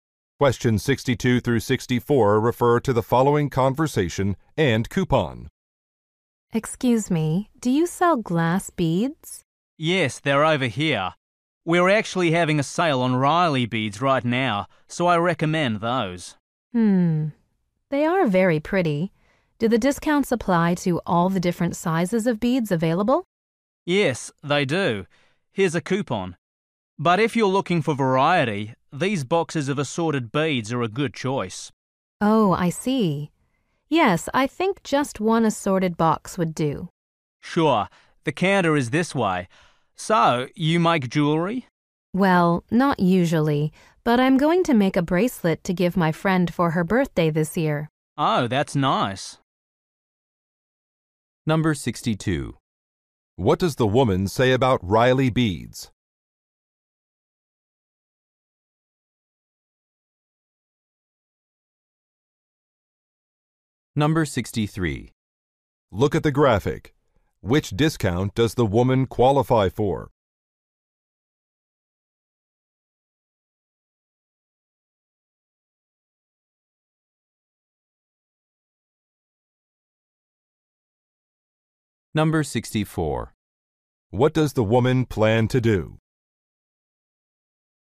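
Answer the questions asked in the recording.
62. They are on sale
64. Make a bracelet for a friend's birthday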